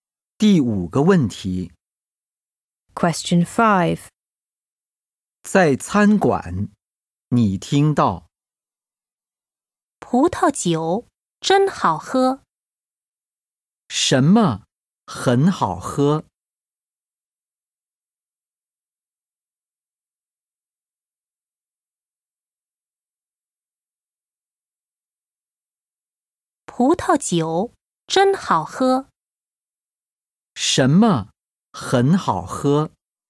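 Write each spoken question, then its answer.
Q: 什么很好喝?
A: 葡萄酒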